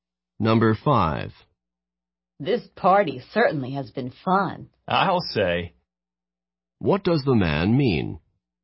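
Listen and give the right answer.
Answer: He agrees that the party has been fun.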